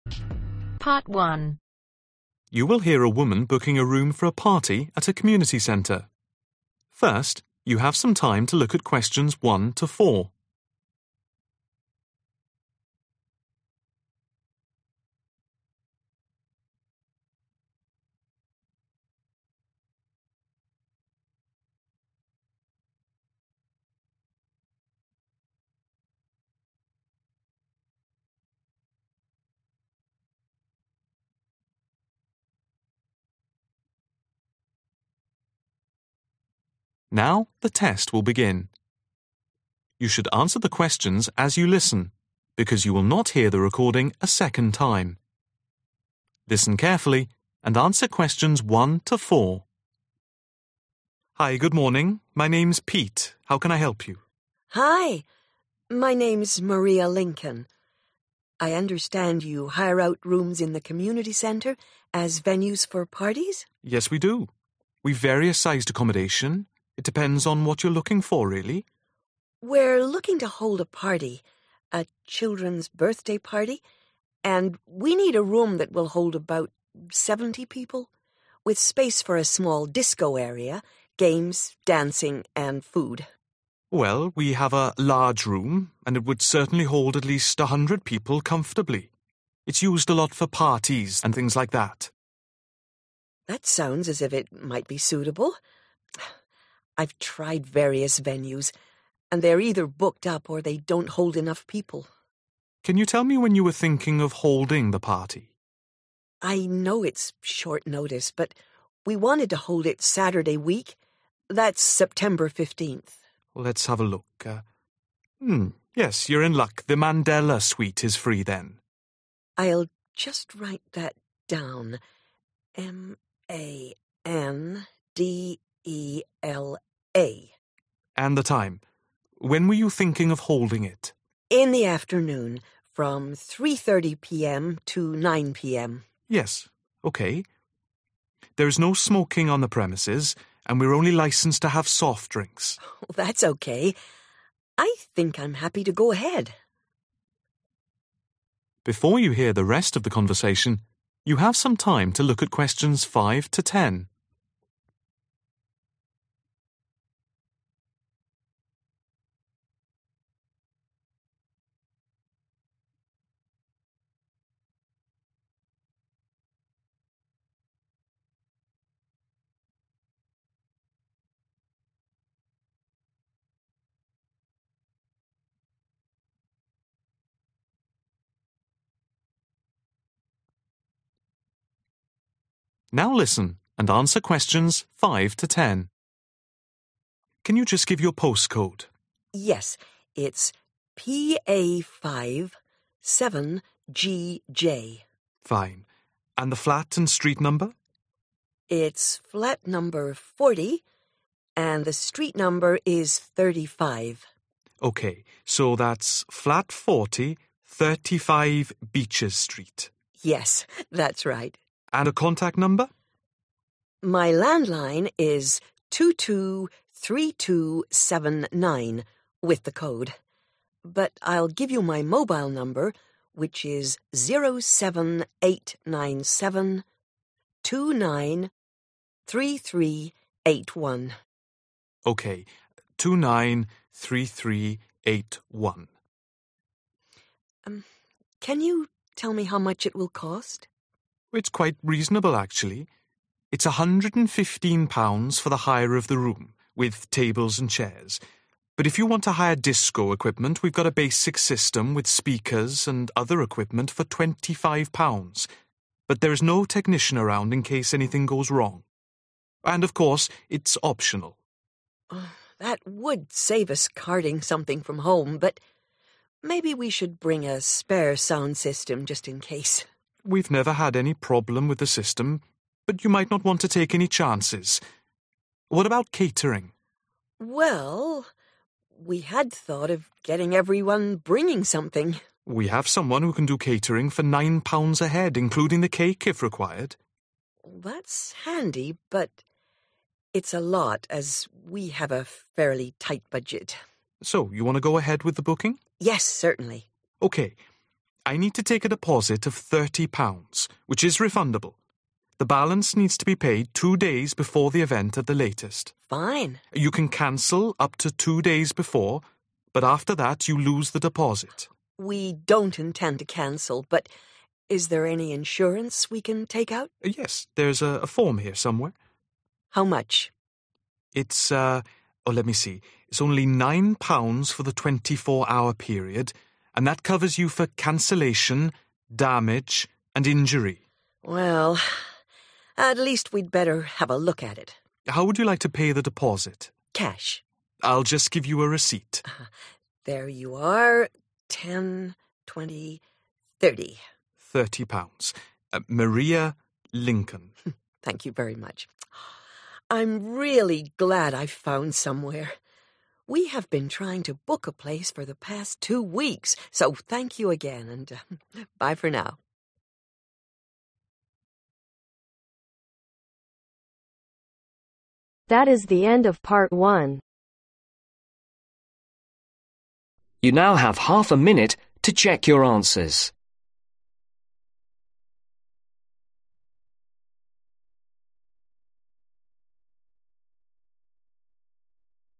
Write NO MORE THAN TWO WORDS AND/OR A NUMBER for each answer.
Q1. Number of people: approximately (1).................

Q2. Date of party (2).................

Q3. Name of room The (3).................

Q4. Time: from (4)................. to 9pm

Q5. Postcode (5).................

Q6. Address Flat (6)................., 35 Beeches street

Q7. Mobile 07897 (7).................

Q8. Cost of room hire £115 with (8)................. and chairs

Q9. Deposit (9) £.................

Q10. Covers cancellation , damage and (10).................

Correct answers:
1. 70
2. 15th September
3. Mandela Suite
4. 3.30
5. PA57GJ
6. 40
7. 293381
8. tables
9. 30
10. injury